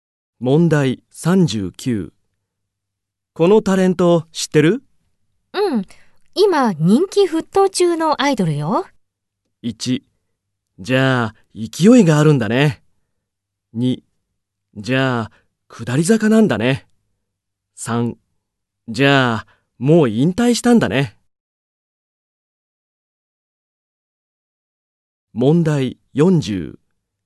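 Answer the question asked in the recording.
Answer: 1: じゃあ勢いがあるんだね。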